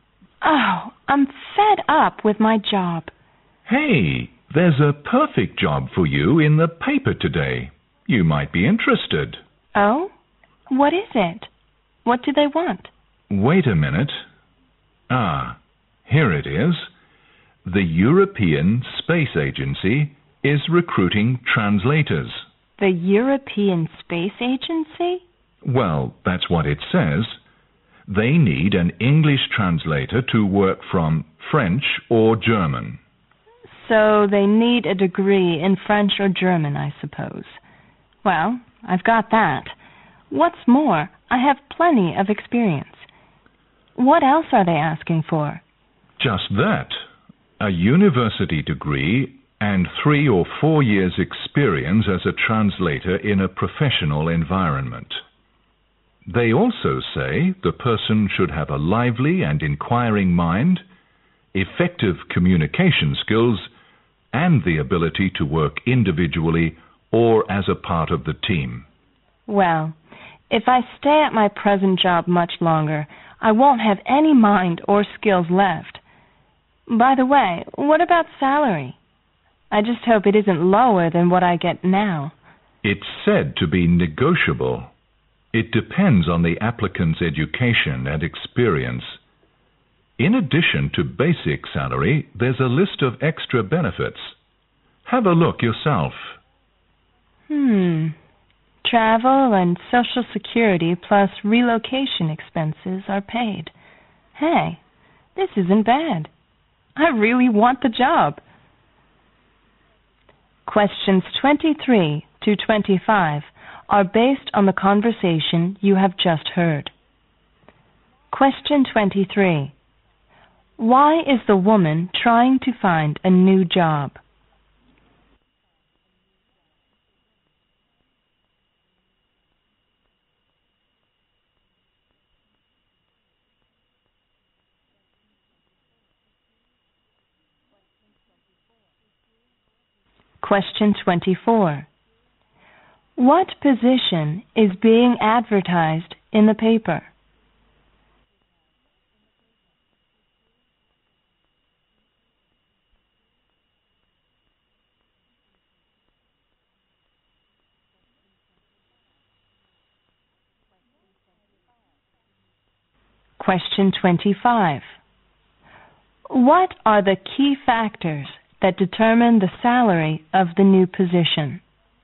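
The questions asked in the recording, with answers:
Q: Why is the woman trying to find a new job?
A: She is fed up with her present job.

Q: What position is being advertised in the paper?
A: An English translator at the European Space Agency.

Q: What are the key factors that determine the salary of the new position?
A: The applicant's education and experience.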